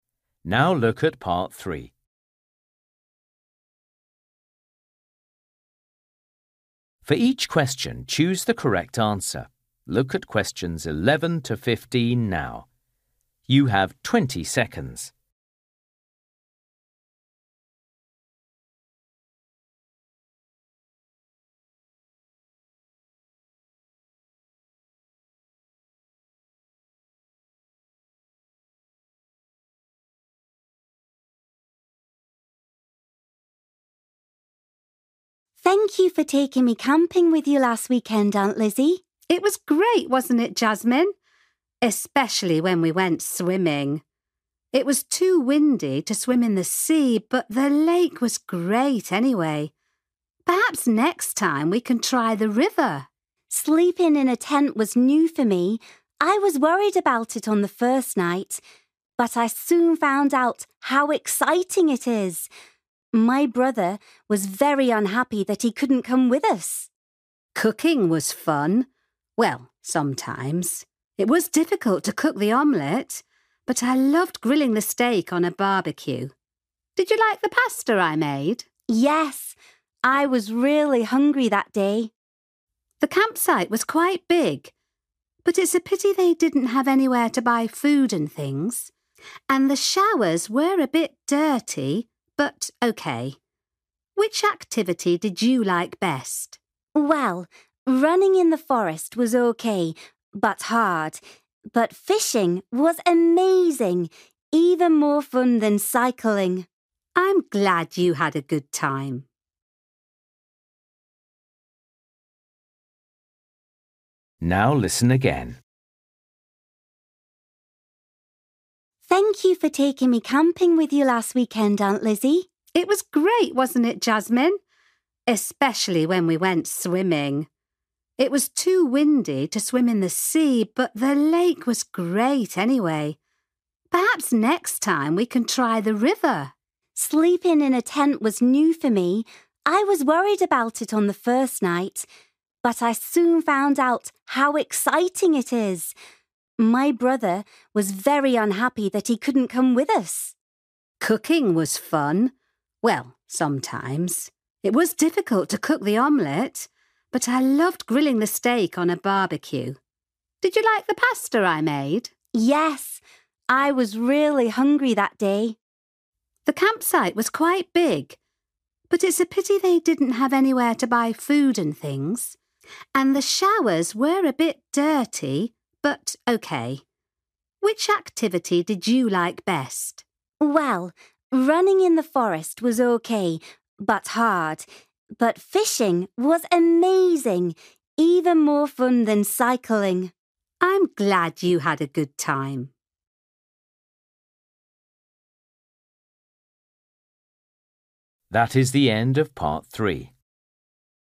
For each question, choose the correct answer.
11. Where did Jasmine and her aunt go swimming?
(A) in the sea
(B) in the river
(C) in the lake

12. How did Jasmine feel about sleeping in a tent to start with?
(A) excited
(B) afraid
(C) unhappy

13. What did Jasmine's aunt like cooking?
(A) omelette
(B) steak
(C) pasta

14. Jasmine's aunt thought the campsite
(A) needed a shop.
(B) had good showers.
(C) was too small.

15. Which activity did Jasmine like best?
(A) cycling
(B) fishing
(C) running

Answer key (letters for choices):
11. C
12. B
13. B
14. A
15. B

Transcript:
Jasmine: Thank you for taking me camping with you last weekend, Aunt Lizzie.
Lizzie: It was great, wasn't it, Jasmine? Especially when we went swimming. It was too windy to swim in the sea, but the lake was great anyway. Perhaps next time we can try the river.
Jasmine: Sleeping in a tent was new for me. I was worried about it on the first night, but I soon found out how exciting it is! My brother was very unhappy that he couldn't come with us.
Lizzie: Cooking was fun. Well, sometimes. It was difficult to cook the omelette, but I loved grilling the steak on a barbecue. Did you like the pasta I made?
Jasmine: Yes, I was really hungry that day.
Lizzie: The campsite was quite big, but it's a pity they didn't have anywhere to buy food and things. And the showers were a bit dirty, but OK. Which activity did you like best?
Jasmine: Well, running in the forest was OK, but hard. But fishing was amazing, even more fun than cycling!
Lizzie: I'm glad you had a good time.

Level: A2